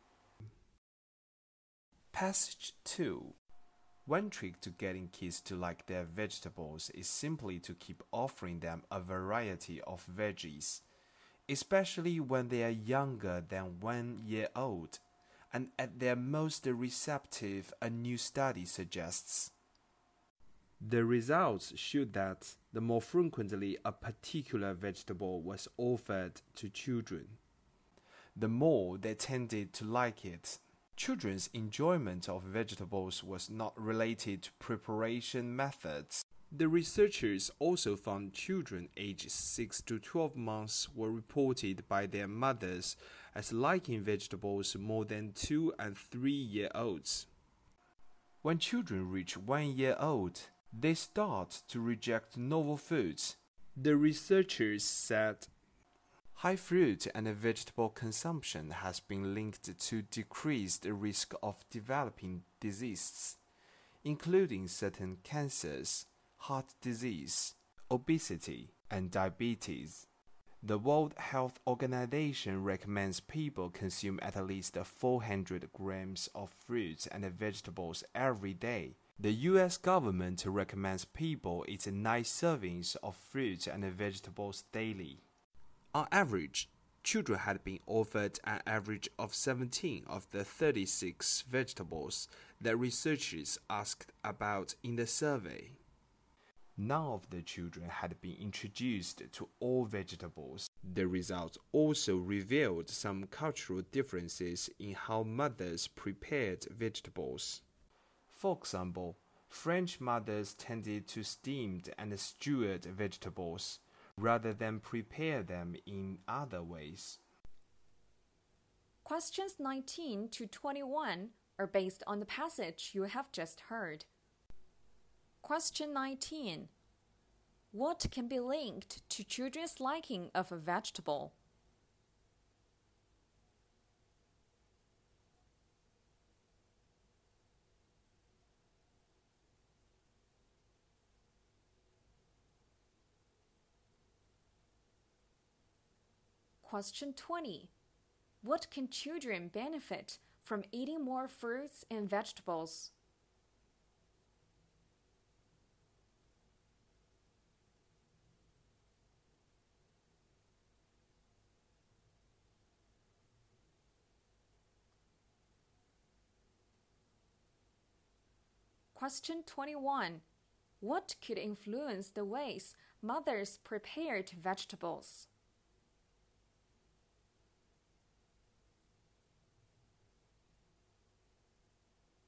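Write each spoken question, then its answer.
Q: What can be linked to children's liking of a vegetable?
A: How frequently it was offered to them.

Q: What can children benefit from eating more fruits and vegetables?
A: A lower risk of developing diseases.

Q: What could influence the ways mothers prepared vegetables?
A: Cultural differences.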